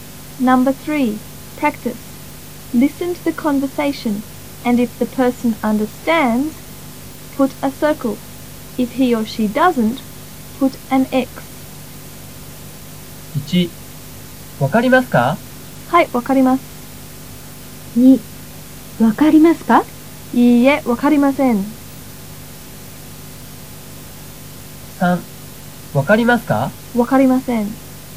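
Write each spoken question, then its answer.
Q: わかりますか?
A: Circle (understands: はい、わかります)

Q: わかりますか?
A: X (doesn't understand: いいえ、わかりません)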